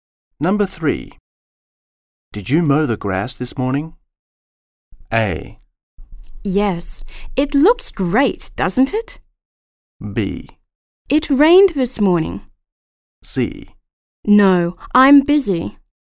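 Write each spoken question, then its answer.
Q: Did you mow the grass this morning?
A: A: Yes, it looks great, doesn't it?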